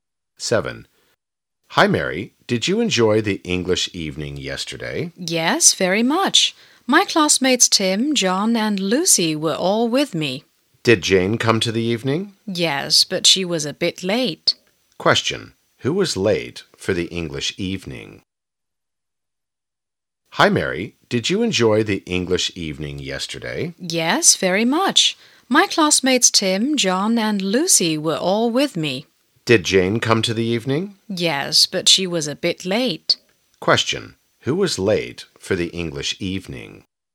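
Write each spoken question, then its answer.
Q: Who was late for the English evening?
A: Jane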